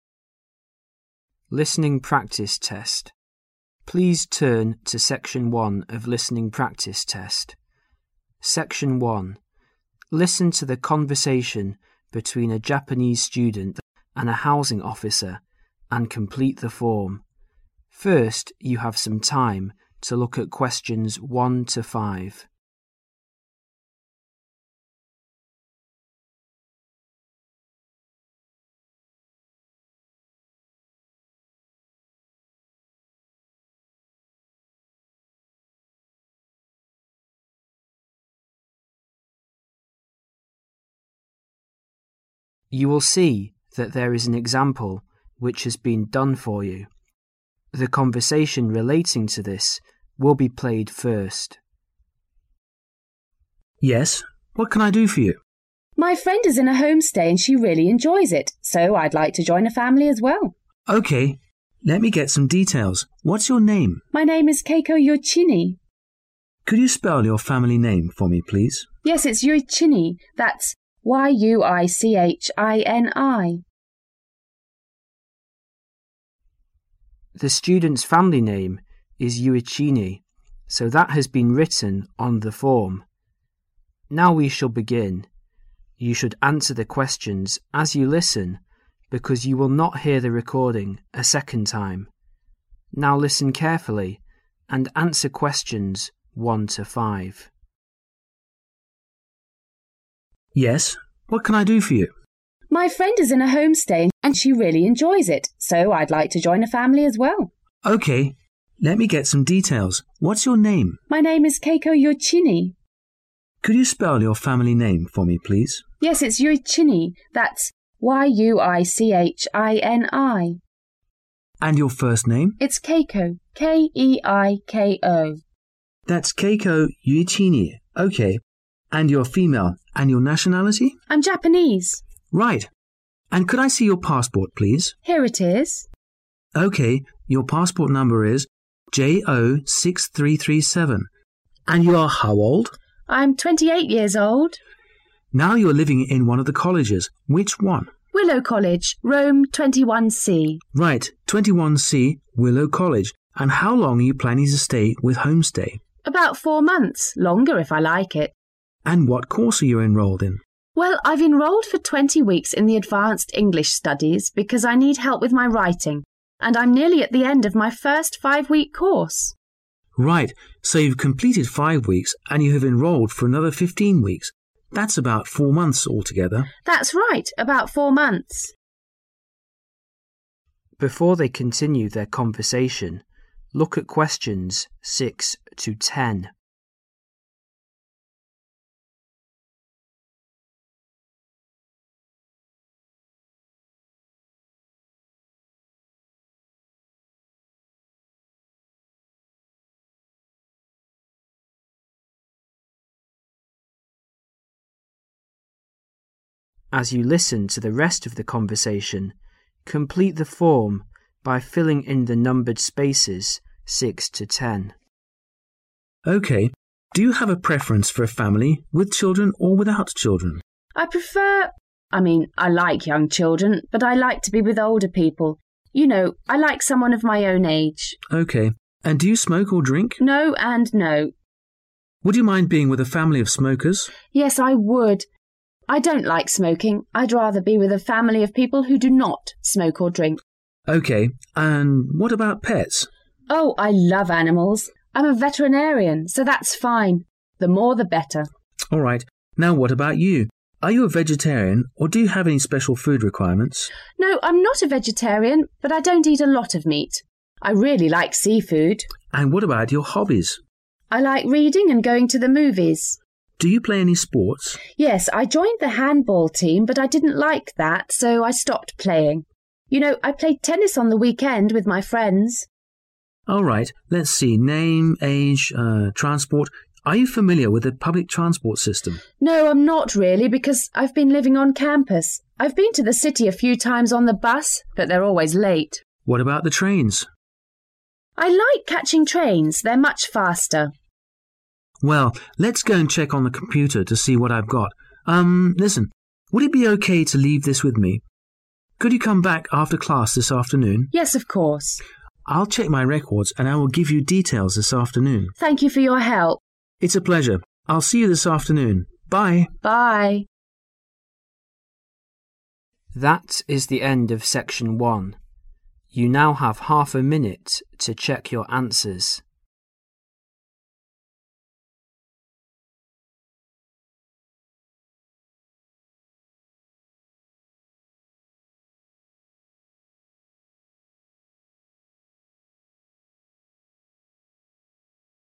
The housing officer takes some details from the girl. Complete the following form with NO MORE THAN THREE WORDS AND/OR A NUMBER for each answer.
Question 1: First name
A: Keiko

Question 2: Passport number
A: JO6337

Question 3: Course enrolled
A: advanced English studies

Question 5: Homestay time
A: About 4 months

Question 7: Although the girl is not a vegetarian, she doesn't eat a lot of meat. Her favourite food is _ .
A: seafood

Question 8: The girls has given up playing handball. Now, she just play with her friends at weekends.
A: tennis

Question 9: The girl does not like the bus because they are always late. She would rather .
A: trains

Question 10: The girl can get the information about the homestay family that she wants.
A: this afternoon

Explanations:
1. Từ cần điền là tên người. Theo như spelling trong script, tên người là K-E-I-K-O, Keiko Đáp án là Keiko Man: And your first name? Girl: It's Keiko, K-E-I-K-O. Man: That's Keiko Yuichini. Okay and you're female and what is your nationality?
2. Từ cần điền là dãy chữ số. Theo như spelling trong script, passport number là J-O-6-3-3-7. Đáp án là JO6337 Your passport number is J-O-6-3-3-7. And you are how old?
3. Từ cần điền là tên khóa học. Đáp án là advanced English studies Well.. I've enrolled for 20 weeks in the advanced English studies because I need help with my writing.
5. Từ cần điền là danh từ chỉ thời gian. Đáp án là 4 months. Girl: That's right, about 4 months.
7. Từ cần điền là danh từ chỉ món ăn. Đáp án là seafood. Man: All right. Now what about you? Are you a vegetarian? Or do you have any special food requirements? Girl: No, I'm not a vegetarian but I don't eat a lot of meat. I really like seafood.
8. Từ cần điền là danh từ chỉ môn thể thao. Đáp án là tennis. Man: Do you play any sports?
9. Từ cần điền là danh từ chỉ phương tiện. Đáp án là trains.
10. Từ cần điền là danh từ. Đáp án là this afternoon. Man: I'll check my records and I will give you details this afternoon.

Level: Listening 6.0 – 8.0